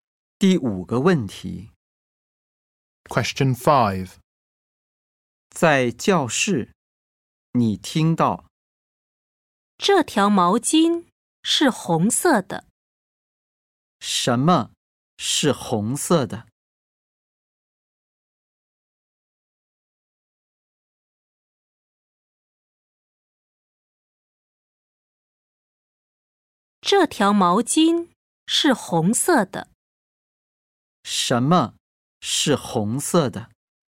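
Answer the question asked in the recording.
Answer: 毛巾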